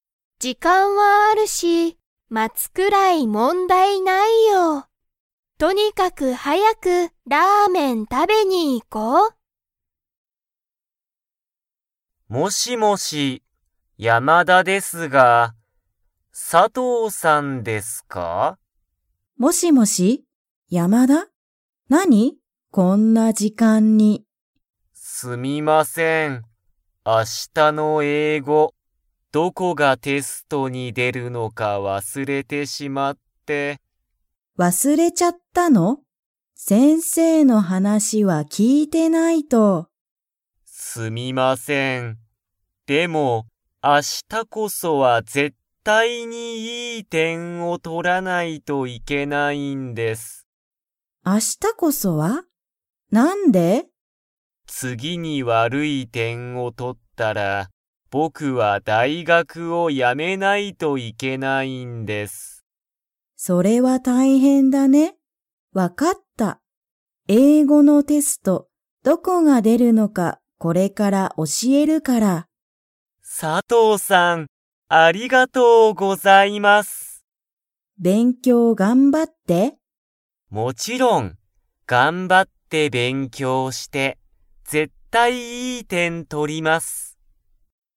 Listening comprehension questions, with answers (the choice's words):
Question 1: 山田(やまだ)さんは、明日(あした)の英語(えいご)のテストにどこが出(で)るのか、わかりますか?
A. はい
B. いいえ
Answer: いいえ

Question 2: 山田(やまだ)さんは、次(つぎ)に悪(わる)い点(てん)をとったら、____を辞(や)めないといけない。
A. 仕事(しごと)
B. 英語(えいご)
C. 勉強(べんきょう)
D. 大学(だいがく)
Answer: 大学(だいがく)